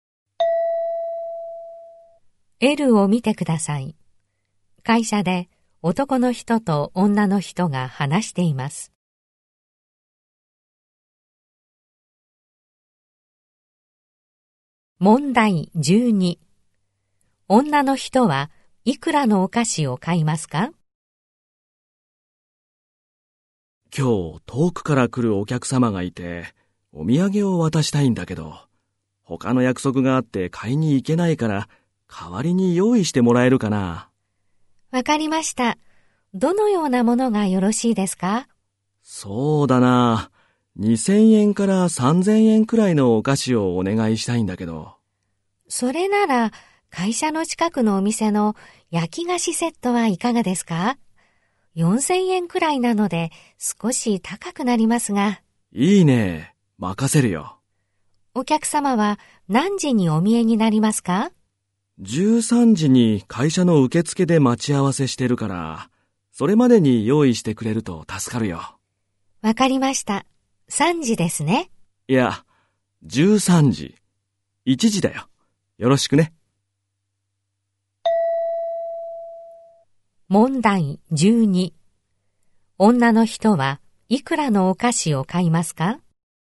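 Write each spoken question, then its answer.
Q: 女の人はいくらのお菓子を買いますか?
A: 4000円くらい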